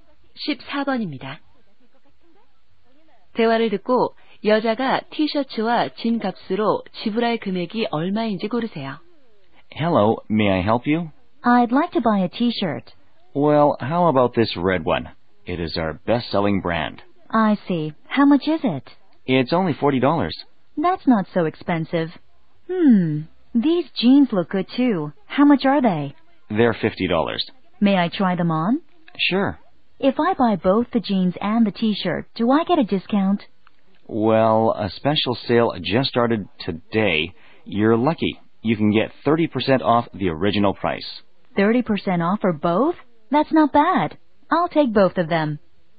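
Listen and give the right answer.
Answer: 63달러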